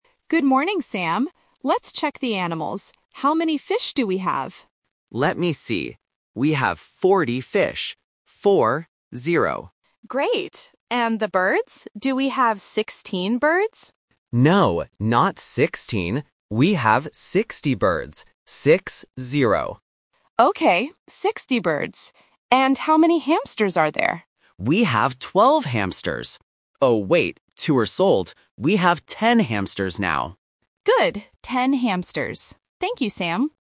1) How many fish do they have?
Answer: 40

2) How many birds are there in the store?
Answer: 60

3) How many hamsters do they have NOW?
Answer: 10

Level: A1